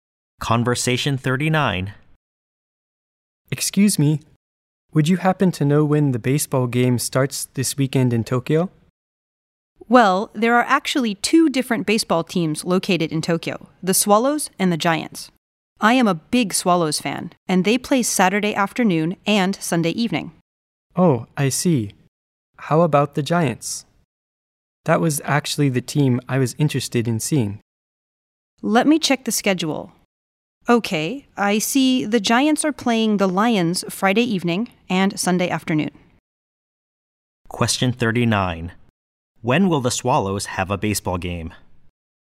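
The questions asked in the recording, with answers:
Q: When will the Swallows have a baseball game?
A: Saturday afternoon and Sunday evening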